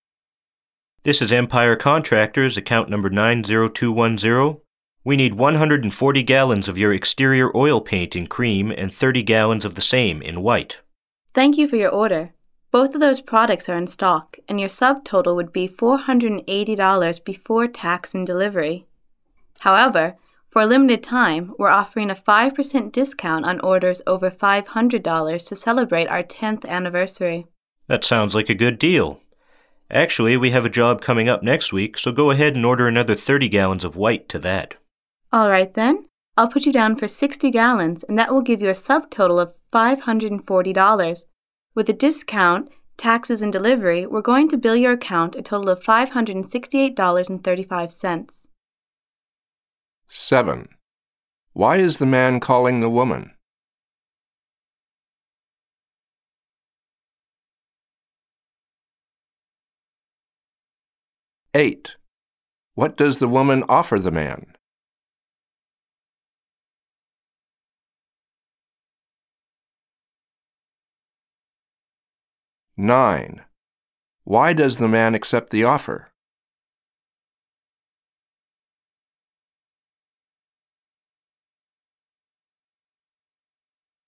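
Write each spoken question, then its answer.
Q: Why is the man calling the woman?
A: To order paint

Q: What does the woman offer the man?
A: A 5% discount on orders over $500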